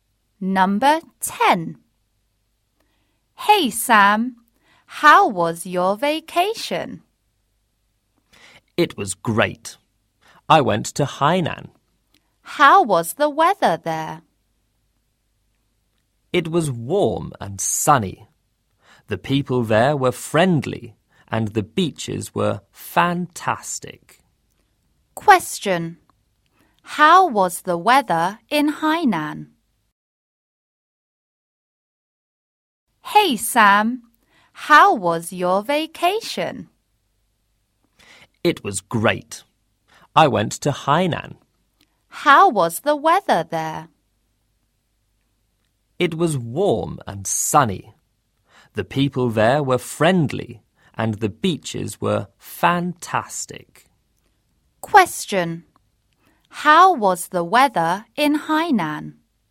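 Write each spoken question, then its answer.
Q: How was the weather in Hainan?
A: Warm and sunny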